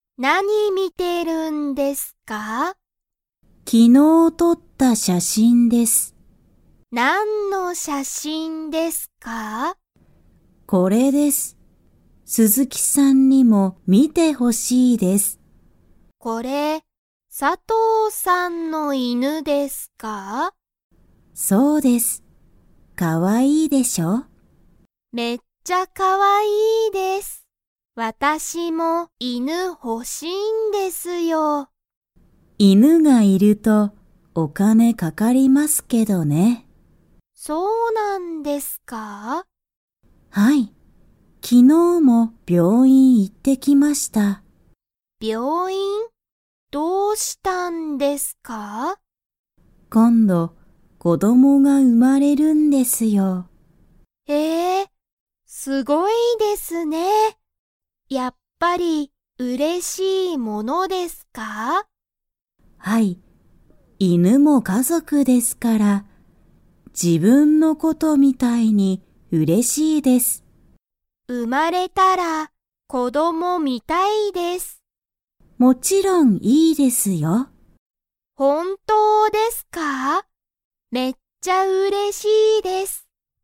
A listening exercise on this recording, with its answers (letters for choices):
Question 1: 佐藤(さとう)さんは、____の写真(しゃしん)を見(み)ている。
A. 子供(こども)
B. 犬(いぬ)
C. 鈴木(すずき)さん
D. 病院(びょういん)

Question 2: 鈴木(すずき)さんは犬(いぬ)が欲(ほ)しいですか?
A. はい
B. いいえ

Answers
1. B
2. A

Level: Level 2